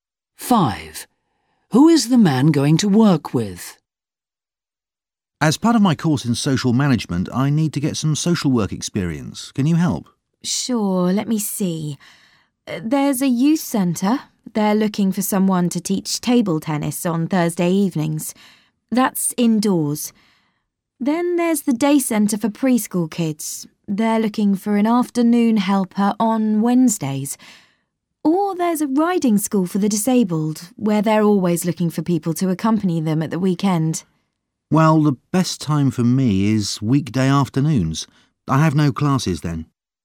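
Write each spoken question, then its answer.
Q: Who is the man going to work with?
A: Preschool children at the day centre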